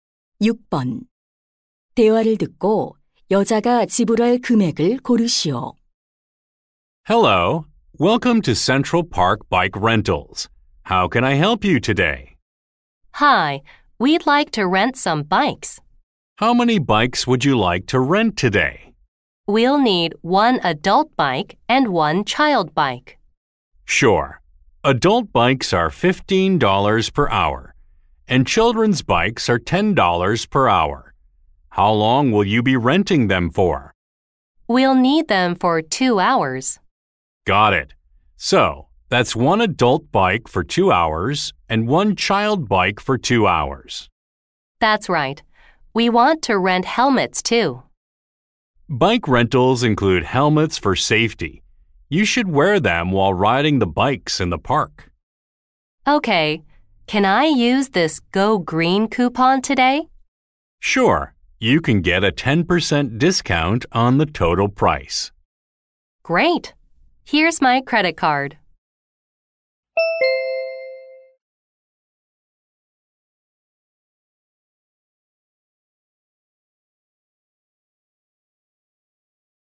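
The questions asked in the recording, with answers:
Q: 대화를 듣고 여자가 지불할 금액을 고르시오.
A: 45달러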